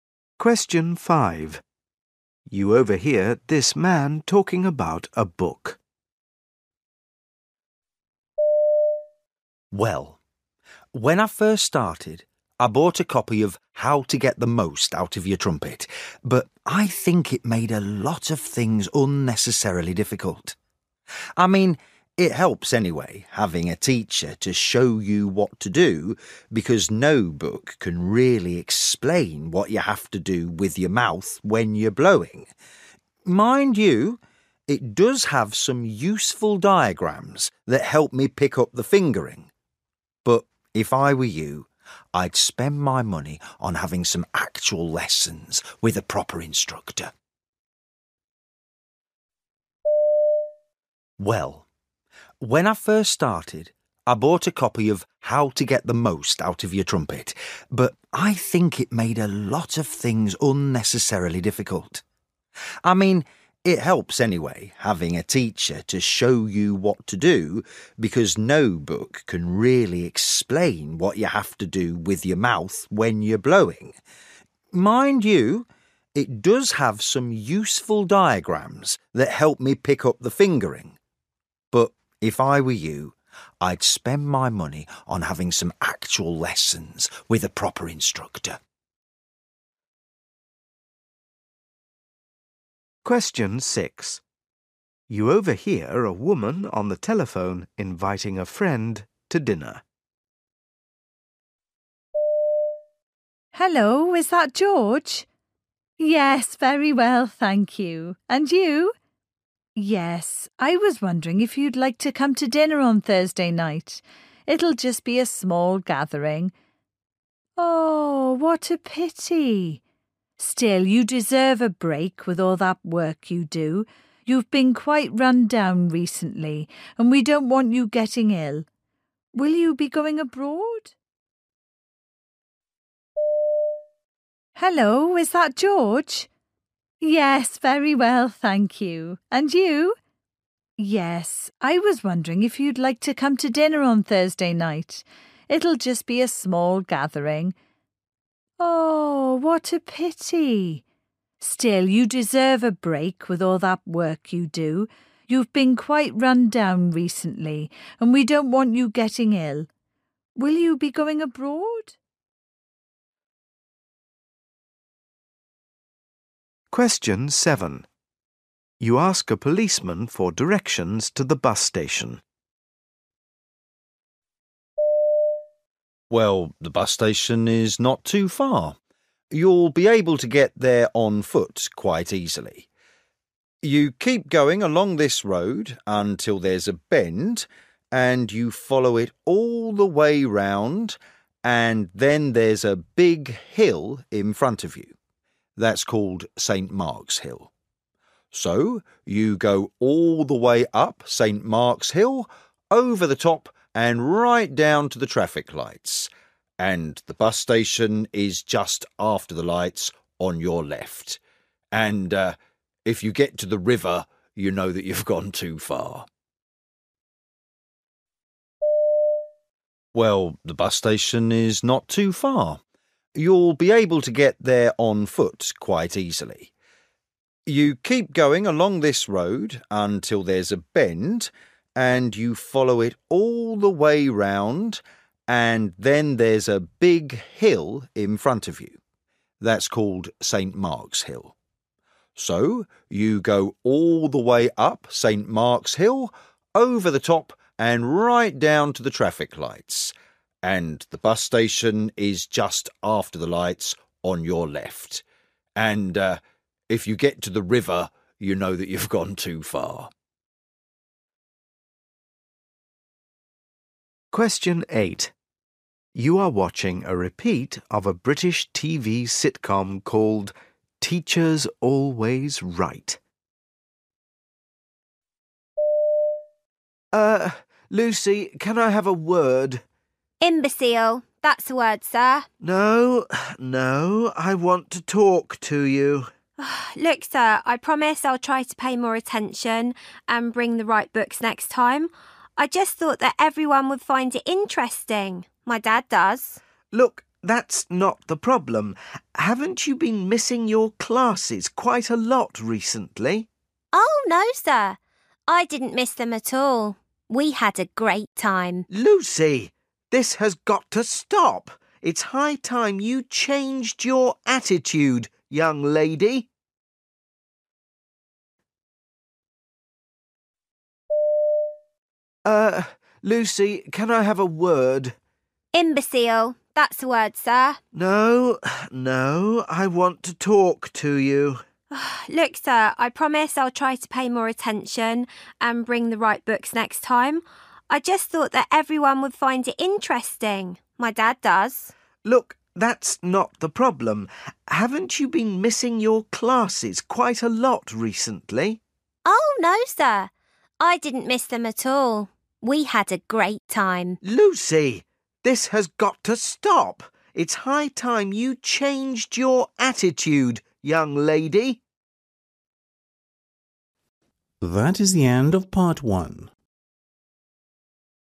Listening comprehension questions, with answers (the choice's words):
You will hear people talking in eight different situations. For questions 1-8, choose the best answer (A, B or C).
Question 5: You overhear this man talking about a book. The man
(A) did not like the book very much.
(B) found it completely useless.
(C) benefited a lot from buying it.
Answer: did not like the book very much.

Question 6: You overhear a woman on the telephone inviting a friend to dinner. The friend cannot come because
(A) he will be away.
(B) he is unwell.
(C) of his work.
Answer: he will be away.

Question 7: You ask a policeman for directions to the bus station. Where is the bus station?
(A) at the top of a hill.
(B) by the river.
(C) at the bottom of a hill.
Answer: at the bottom of a hill.

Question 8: You are watching a repeat of a British TV sitcom called Teacher's Always Right. What does the teacher want the girl to do?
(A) stop misbehaving in lessons.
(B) stop missing lessons.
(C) bring the right books.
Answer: stop missing lessons.

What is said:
Cookery courses for the new year are in Chinese, South American and Indian cuisine and will take place at the centre on weekday evenings apart from the Indian cookery course on Mondays, Wednesdays and Saturdays, which will consequently last an extra 2 weeks beyond the usual 5-week duration.
5 You overhear this man talking about a book.
Well, when I first started, I bought a copy of 'How to Get the Most Out of your Trumpet'; but I think it made a lot of things unnecessarily difficult. I mean, it helps anyway having a teacher to show you what to do because no book can really explain what you have to do with your mouth when you're blowing. Mind you, it does have some useful diagrams that helped me pick up the fingering ... but if I were you, I'd spend my money on having some actual lessons with a proper instructor.
6 You overhear a woman on the telephone inviting a friend to dinner.
Hello, is that George? Yes, very well thank you ... and you? Yes, I was wondering if you'd like to come to dinner on Thursday night ... it'll just be a small gathering ... Oh, what a pity. Still, you deserve a break with all that work you do. You've been quite run down recently – and we don't want you getting ill. Will you be going abroad?
7 You ask a policeman for directions to the bus station.
Well, the bus station is not too far. You'll be able to get there on foot quite easily. You keep going along this road until there's a bend and you follow it all the way round and then there's a big hill in front of you. That's called St Mark's Hill. So, you go all the way up St Mark's Hill, over the top and right down to the traffic lights ... and the bus station is just after the lights ... on your left ... and if you get to the river, you know that you've gone too far.
8 You are watching a repeat of a British TV sitcom called Teacher's Always Right.
T: Er ... Lucy can I have a word?
L: 'Imbecile' ... that's a word, sir.
T: No, no, I want to talk to you.
L: Look, sir, I promise I'll try to pay more attention and bring the right books next time, I just thought that everyone would find it interesting – my Dad does.
T: Look, that's not the problem ... haven't you been missing your classes quite a lot recently?
L: Oh, no sir. I didn't miss them at all. We had a great time.
T: Lucy, this has got to stop. It's high time you changed your attitude, young lady.